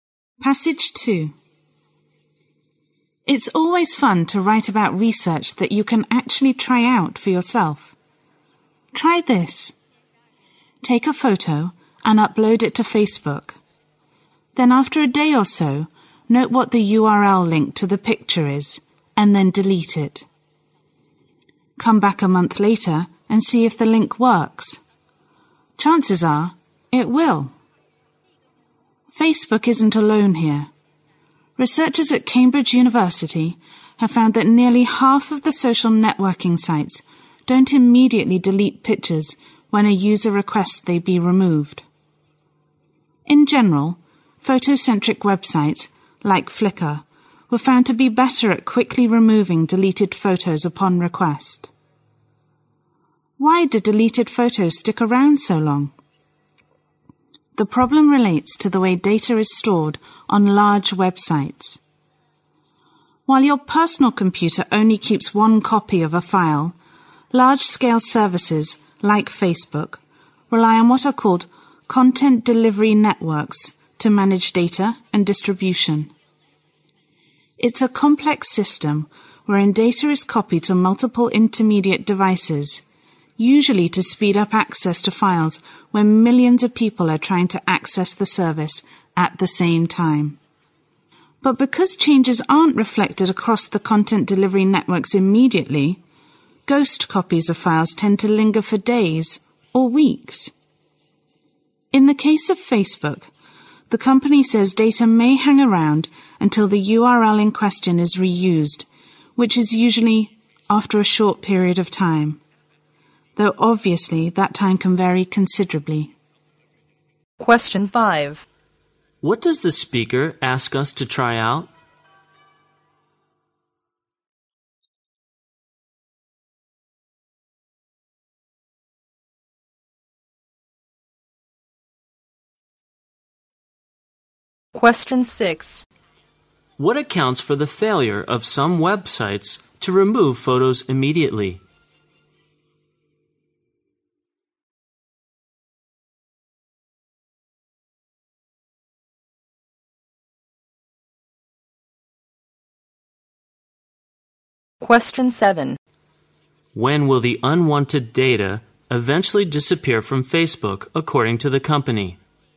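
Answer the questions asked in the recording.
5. Upload a photo to Facebook, delete it, and check later if its link still works
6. The way data is stored: copies spread across content delivery networks
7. When the URL is reused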